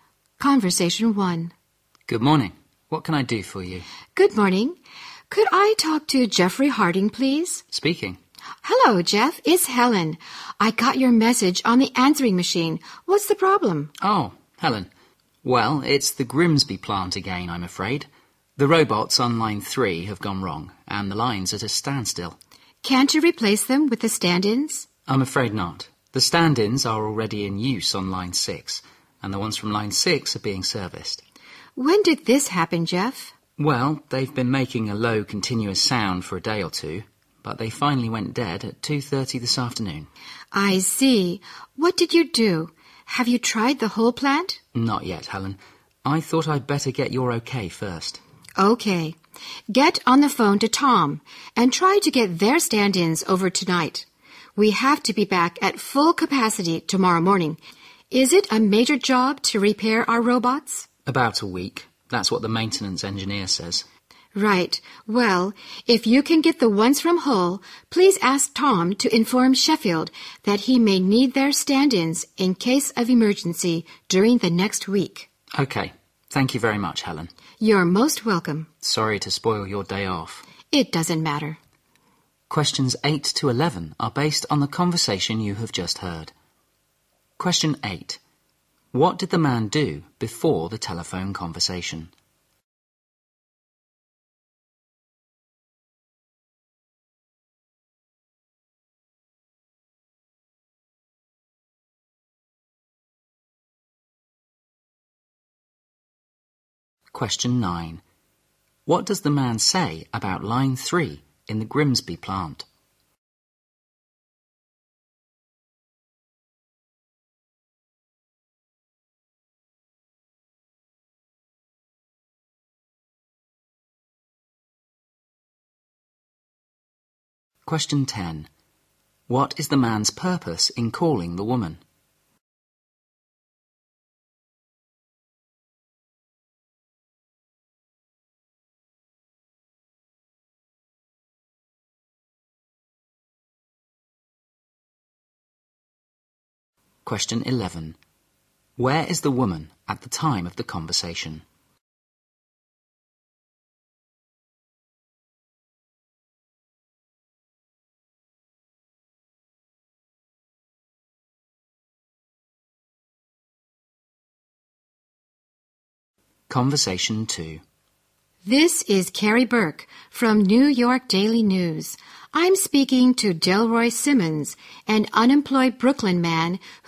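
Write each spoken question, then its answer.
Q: What did the man do before the telephone conversation?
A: He left a message on the woman's answering machine

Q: What does the man say about line 3 in the Grimsby plant?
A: Its robots went wrong and the line is at a standstill

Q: What is the man's purpose in calling the woman?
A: To get her okay on what to do about the broken robots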